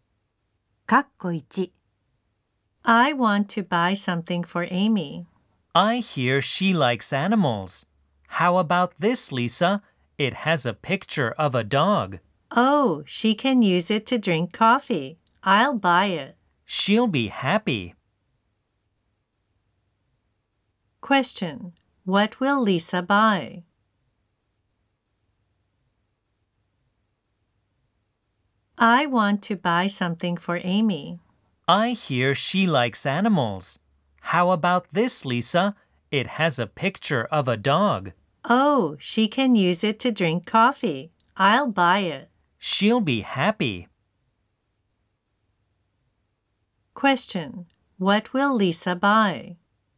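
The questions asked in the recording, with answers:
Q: Question: What will Lisa buy?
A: A cup with a picture of a dog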